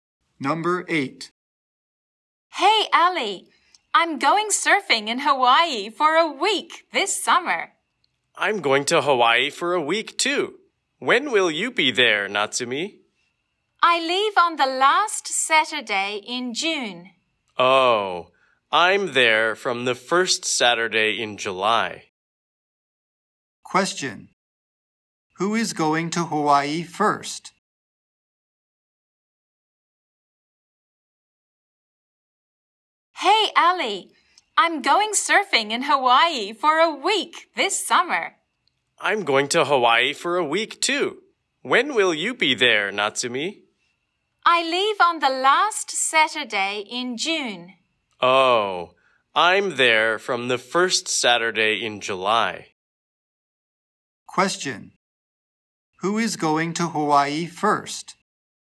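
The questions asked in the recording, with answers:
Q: Who is going to Hawaii first?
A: Natsumi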